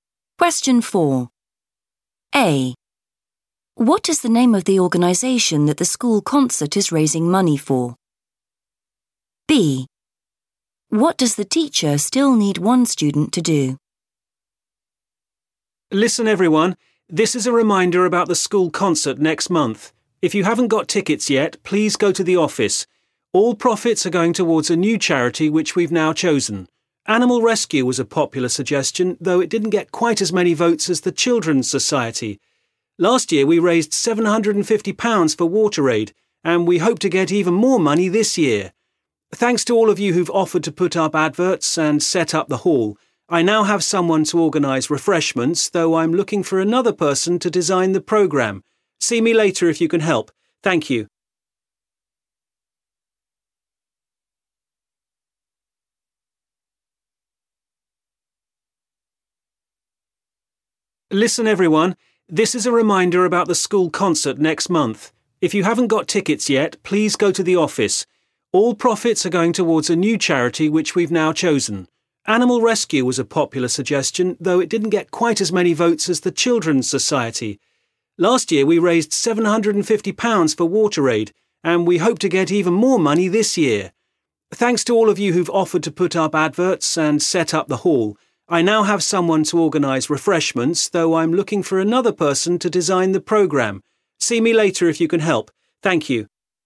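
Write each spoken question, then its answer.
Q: What is the name of the organization that the school concert is raising money for?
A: the Children's Society

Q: What does the teacher still need one student to do?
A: design the programme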